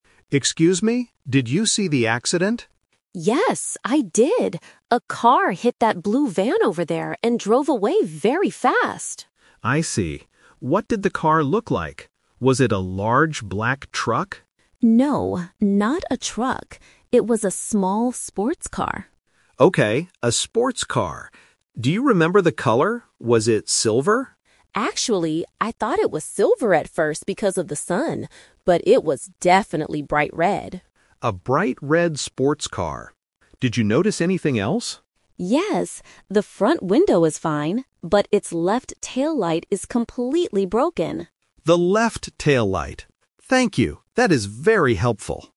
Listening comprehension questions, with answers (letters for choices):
Listen to the conversation between a police officer and a witness, and choose the correct answer (A, B, or C).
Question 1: What kind of vehicle caused the accident and drove away?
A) A blue van.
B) A small sports car.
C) A large black truck.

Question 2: What color is the car that drove away?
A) Silver.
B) White.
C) Bright red.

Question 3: What part of the sports car is broken?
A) The front window.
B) The left taillight.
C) The right mirror.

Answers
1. B
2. C
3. B

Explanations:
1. The witness says, "It was a small sports car." The Trap: Option (A) is a trap because the "blue van" is the vehicle that got hit, not the one that drove away. Option (C) is a trap because the police officer asks if it was a "large black truck," but the witness says no.
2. The witness uses the "Twist" technique: "I thought it was silver at first... but it was definitely bright red." The Trap: Option (A) is the trap because the witness thought it was silver at first due to the sun. Option (B) is a common car color but is never mentioned in the audio.
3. The witness explicitly states, "...but its left taillight is completely broken." The Trap: Option (A) is a trap because the "front window" is mentioned, but the witness says it is "fine" (not broken). Option (C) is not mentioned in the audio.

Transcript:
Police Officer: Excuse me, did you see the accident?
Witness: Yes, I did! A car hit that blue van over there and drove away very fast.
Police Officer: I see. What did the car look like? Was it a large black truck?
Witness: No, not a truck. It was a small sports car.
Police Officer: Okay, a sports car. Do you remember the color? Was it silver?
Witness: Actually, I thought it was silver at first because of the sun, but it was definitely bright red.
Police Officer: A bright red sports car. Did you notice anything else?
Witness: Yes! The front window is fine, but its left taillight is completely broken.
Police Officer: The left taillight. Thank you, that is very helpful!